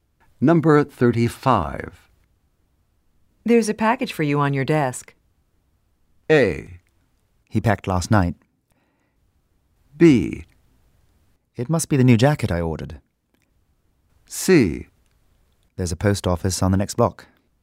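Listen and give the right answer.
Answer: B: It must be the new jacket I ordered.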